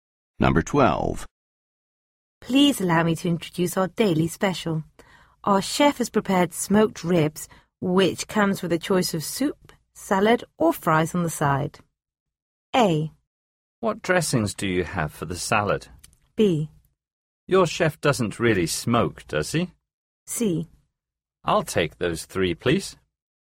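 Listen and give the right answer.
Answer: A: What dressings do you have for the salad?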